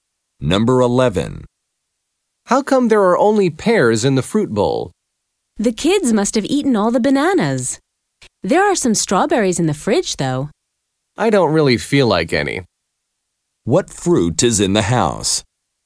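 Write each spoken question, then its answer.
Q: What fruit is in the house?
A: Pears and strawberries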